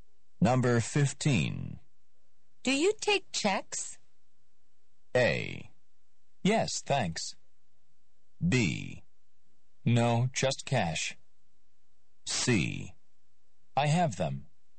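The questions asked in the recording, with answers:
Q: Do you take checks?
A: B: No, just cash.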